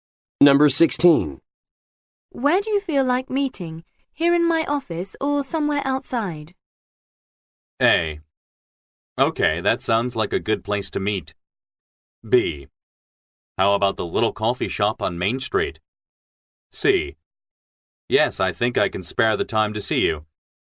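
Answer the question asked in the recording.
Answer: B: How about the little coffee shop on Main Street?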